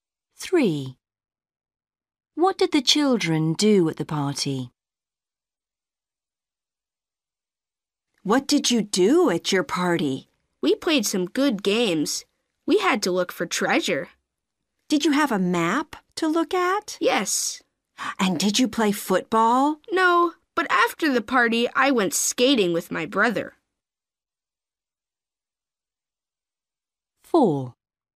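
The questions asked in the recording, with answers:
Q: What did the children do at the party?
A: They looked for treasure (played games)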